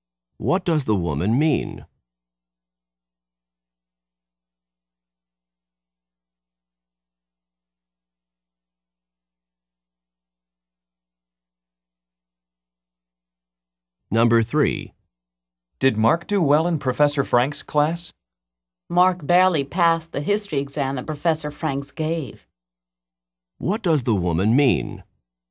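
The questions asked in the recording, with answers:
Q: What does the woman mean?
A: Mark almost failed the exam.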